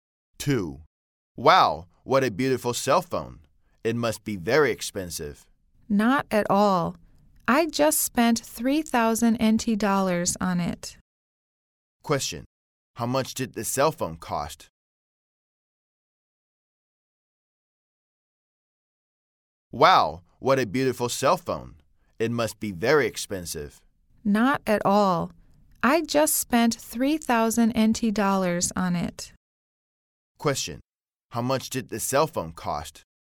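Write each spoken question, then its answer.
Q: How much did the cell phone cost?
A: 3,000 NT dollars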